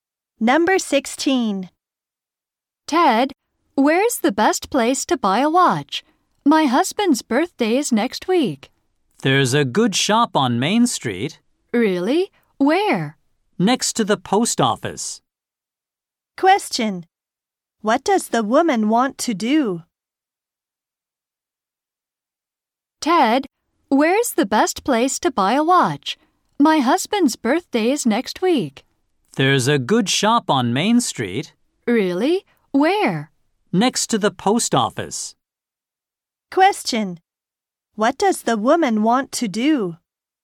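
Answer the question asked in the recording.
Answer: Buy a watch for her husband's birthday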